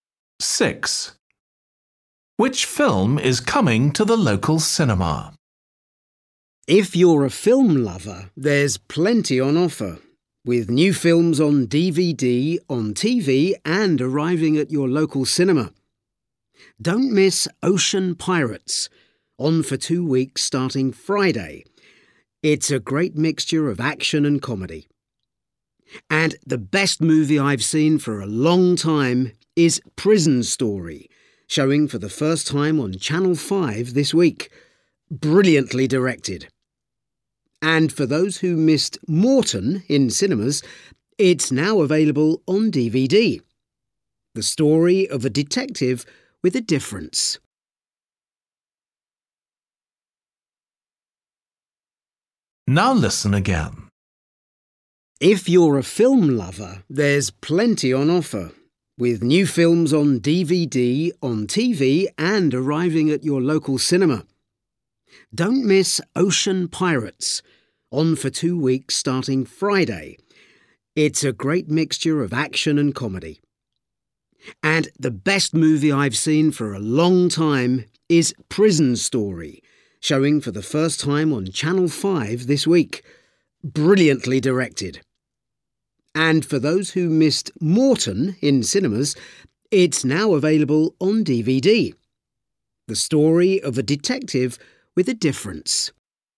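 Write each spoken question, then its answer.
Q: Which film is coming to the local cinema?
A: Ocean Pirates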